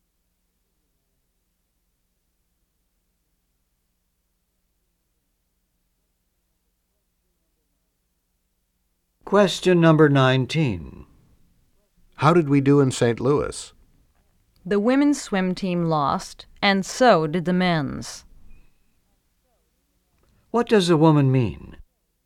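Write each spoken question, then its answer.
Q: What does a woman mean?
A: Both swim teams lost.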